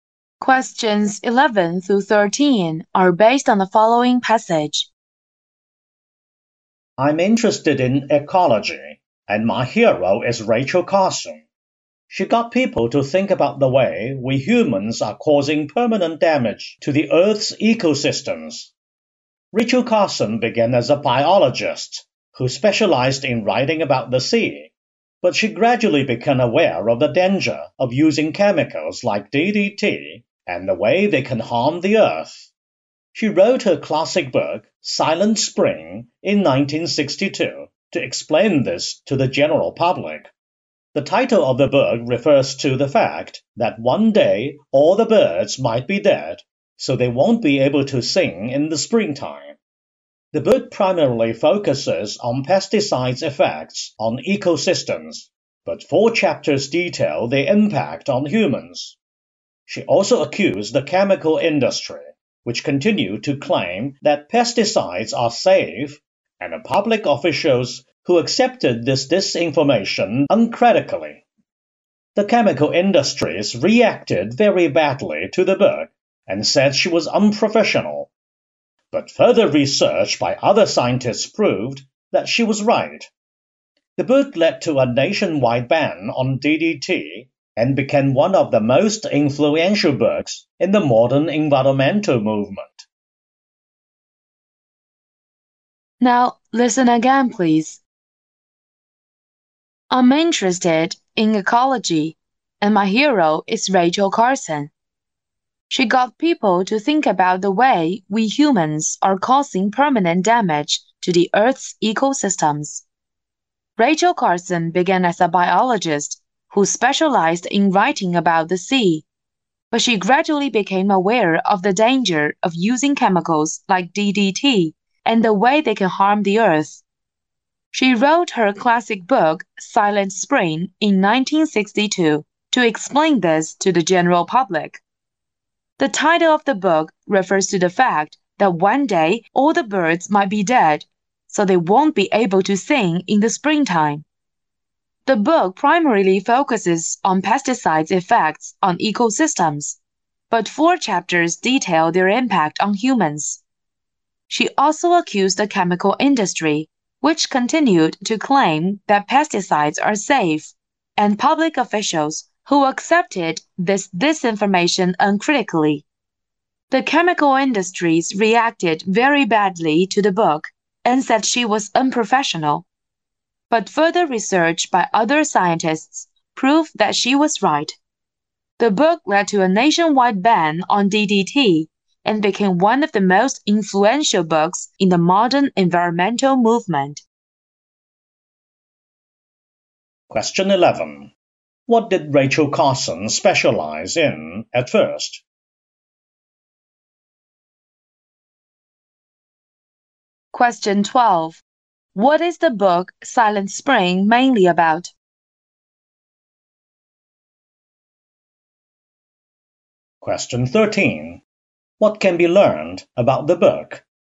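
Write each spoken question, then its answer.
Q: What did Rachel Carson specialize in at first?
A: Writing about the sea as a biologist

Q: What is the book Silent Spring mainly about?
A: The effects of pesticides on ecosystems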